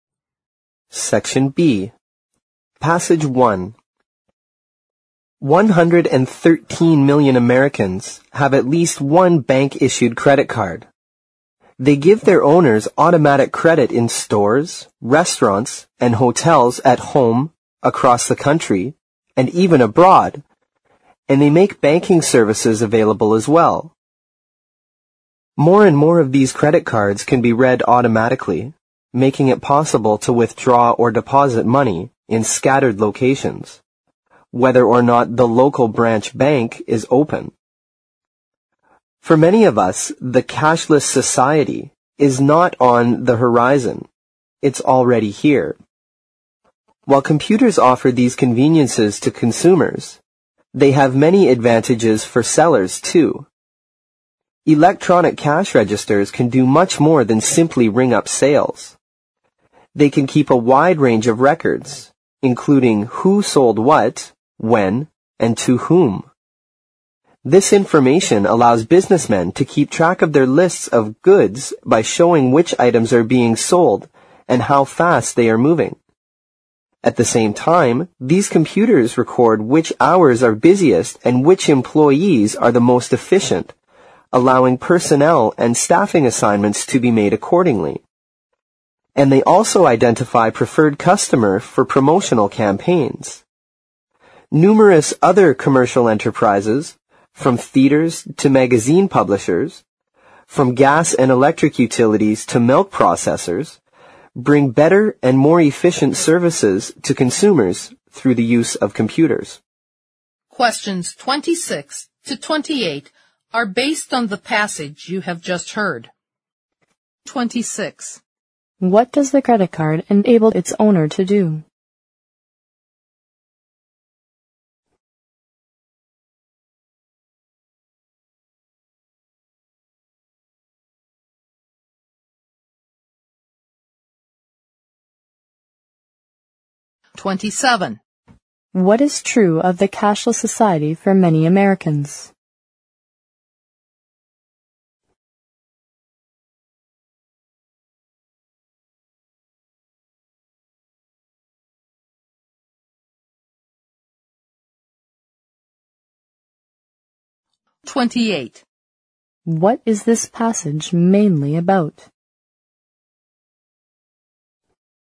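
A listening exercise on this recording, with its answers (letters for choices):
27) 27.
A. It's still on the horizon.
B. It's far from entering their life.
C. It's already here with them.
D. It's only a beautiful dream.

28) 28.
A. Use of computers in banks.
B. Conveniences brought about by computers in business.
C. Significance of automation in commercial enterprises.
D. Credit cards in the business world.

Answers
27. C
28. B

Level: 四级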